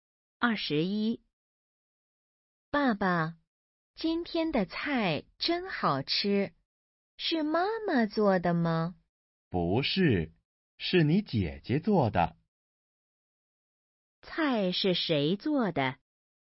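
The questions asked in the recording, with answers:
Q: 菜是谁做的?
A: 姐姐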